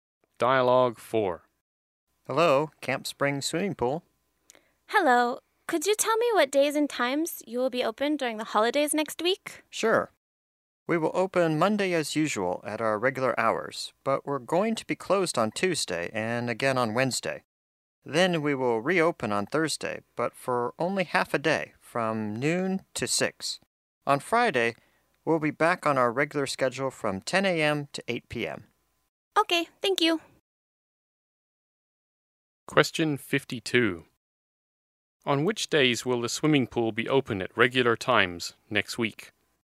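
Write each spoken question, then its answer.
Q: On which days will the swimming pool be open at regular times next week?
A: Monday and Friday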